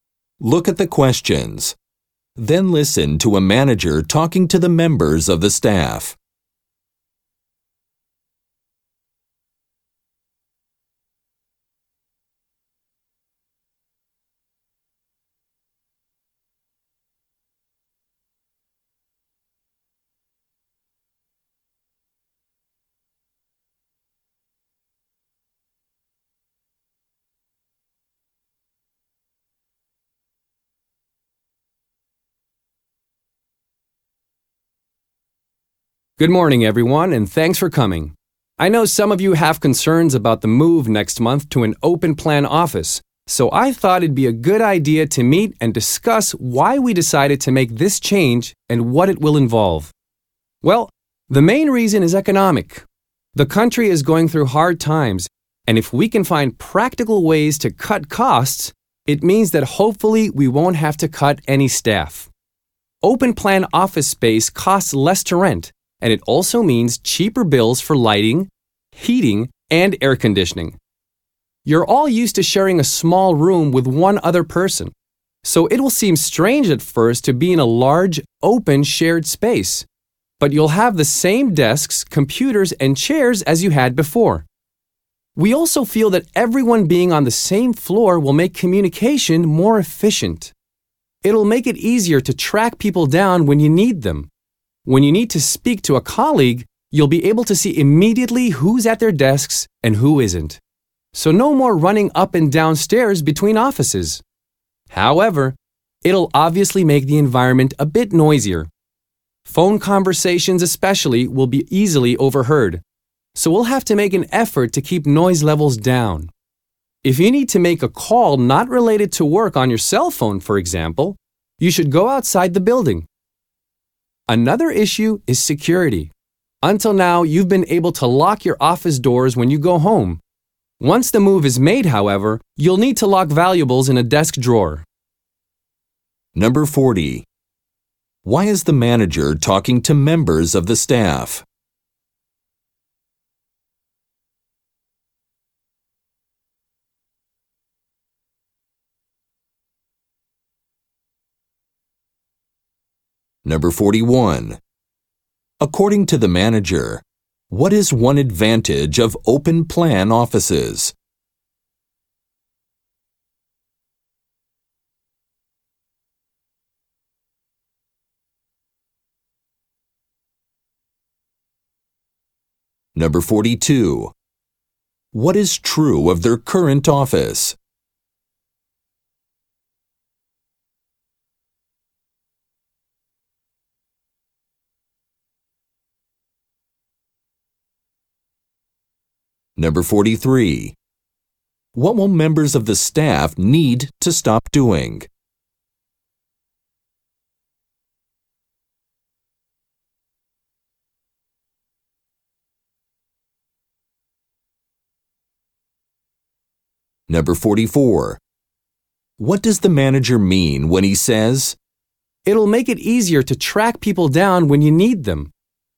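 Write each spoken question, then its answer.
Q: Why is the manager talking to members of the staff?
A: To explain the move to an open-plan office

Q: What is true of their current office?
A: Each person shares a small room with one other person

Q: What does the manager mean when he says,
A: It will be easier to find colleagues when you need them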